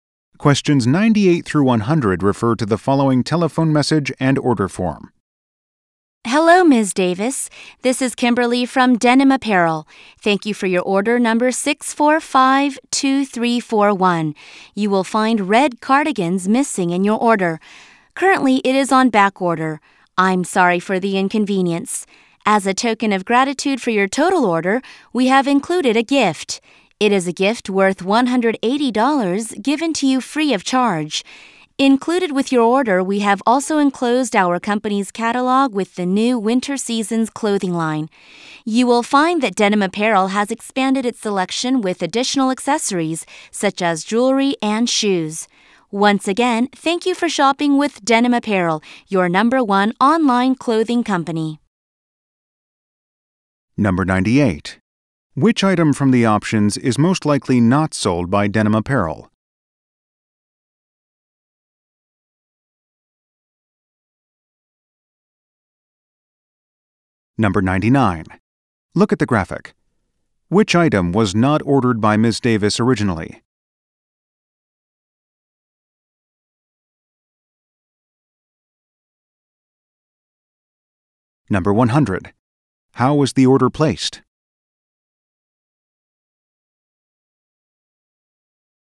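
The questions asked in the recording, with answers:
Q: How was the order placed?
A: Online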